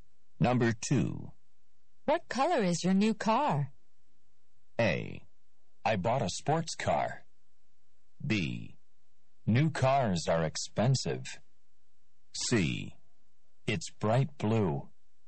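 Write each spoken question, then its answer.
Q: What color is your new car?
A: C: It's bright blue.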